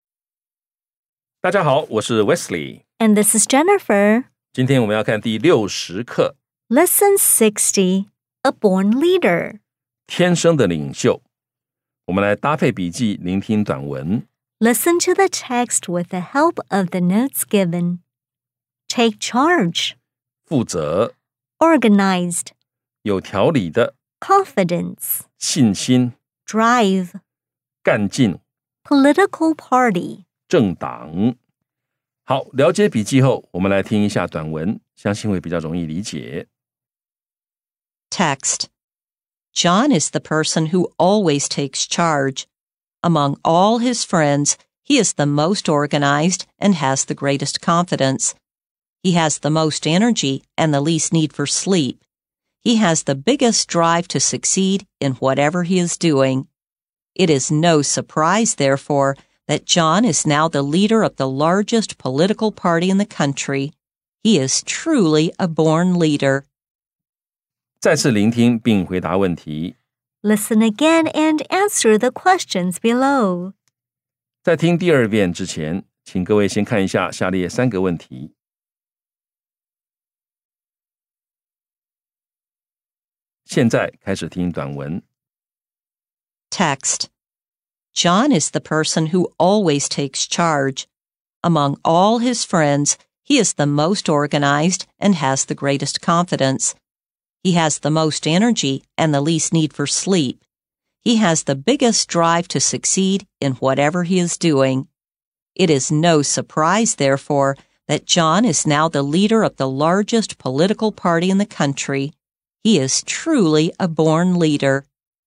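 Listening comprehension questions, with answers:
再次聆聽並回答問題 Listen again and answer the questions below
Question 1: Is John the kind of person that always leads others?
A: Yes, he always takes charge.

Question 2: Is John a confident person?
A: Yes, he has the greatest confidence.

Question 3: What does John do now?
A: He is the leader of the largest political party in the country.

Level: 中階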